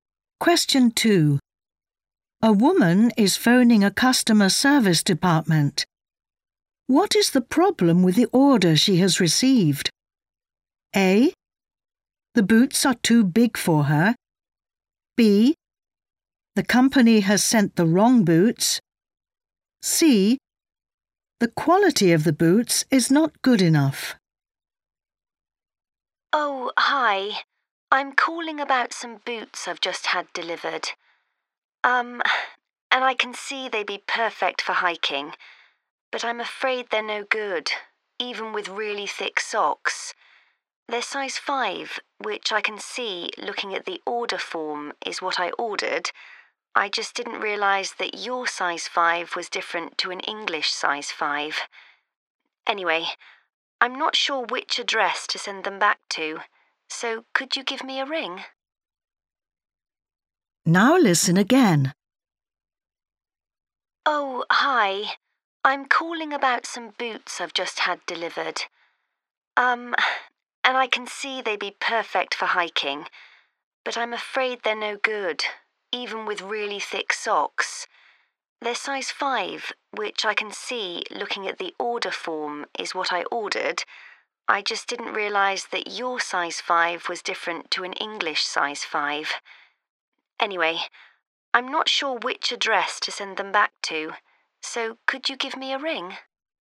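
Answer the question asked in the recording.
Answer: A: The boots are too big for her.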